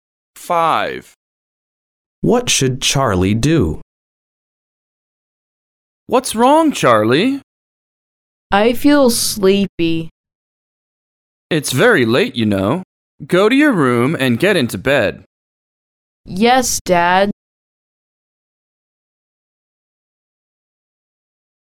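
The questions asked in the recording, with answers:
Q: What should Charlie do?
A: go to his room and get into bed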